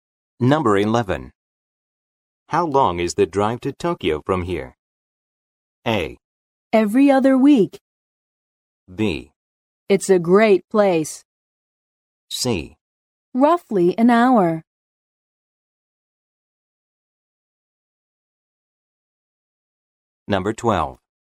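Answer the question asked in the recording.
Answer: C: Roughly an hour.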